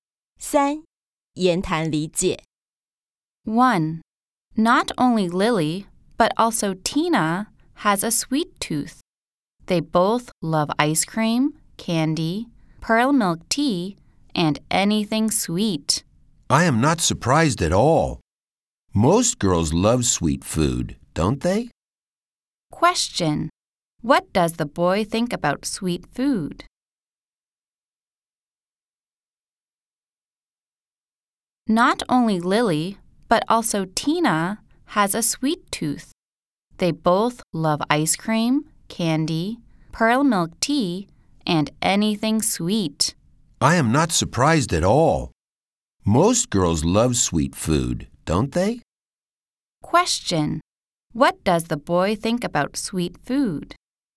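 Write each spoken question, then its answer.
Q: What does the boy think about sweet food?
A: Most girls love sweet food.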